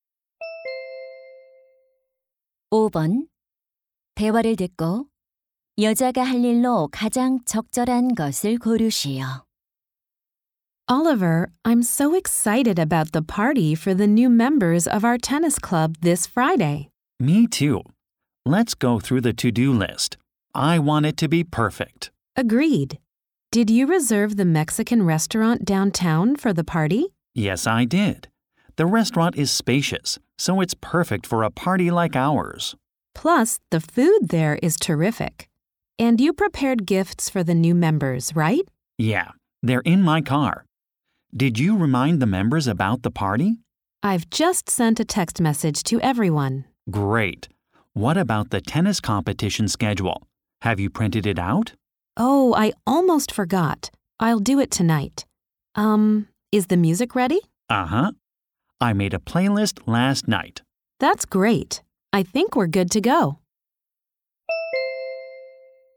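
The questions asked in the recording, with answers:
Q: 대화를 듣고 여자가 할 일로 가장 적절한 것을 고르시오.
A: 테니스 대회 일정표 출력하기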